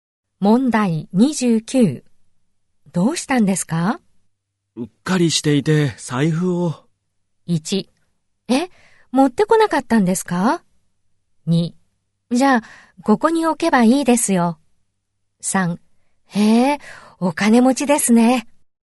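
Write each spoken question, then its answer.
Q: うっかりしていて財布を。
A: 1: え、持ってこなかったんですか?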